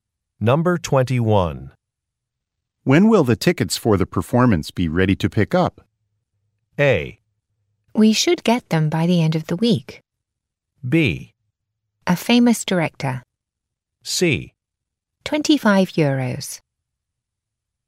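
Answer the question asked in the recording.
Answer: A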